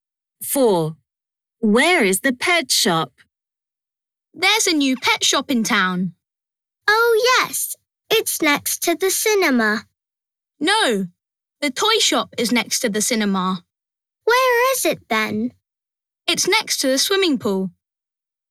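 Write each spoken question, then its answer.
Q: Where is the pet shop?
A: next to the swimming pool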